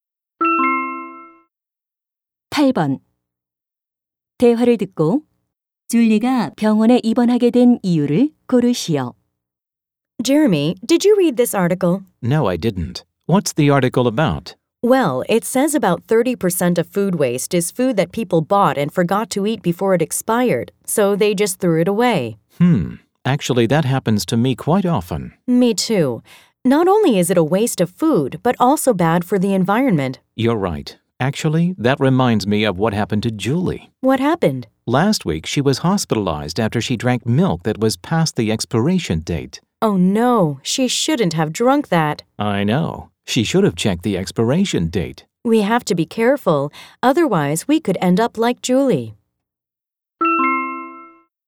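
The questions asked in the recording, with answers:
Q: 대화를 듣고 줄리가 병원에 입원하게 된 이유를 고르시오.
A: 유통기한이 지난 우유를 마셔서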